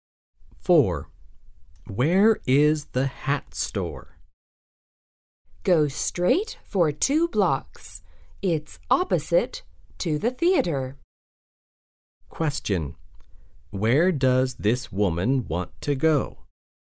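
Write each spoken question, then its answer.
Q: Where does this woman want to go?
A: The hat store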